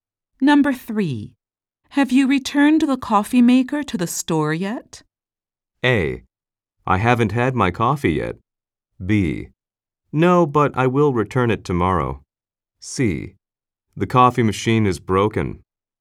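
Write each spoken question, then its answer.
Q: Have you returned the coffee maker to the store yet?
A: B: No, but I will return it tomorrow.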